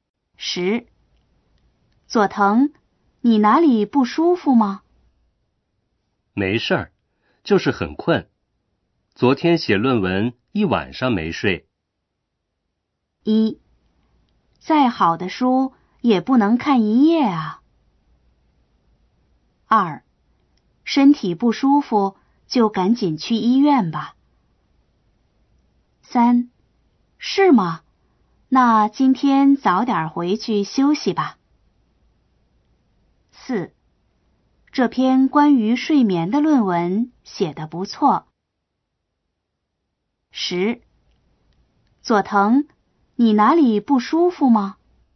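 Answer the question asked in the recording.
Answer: 3: 是吗?那今天早点回去休息吧。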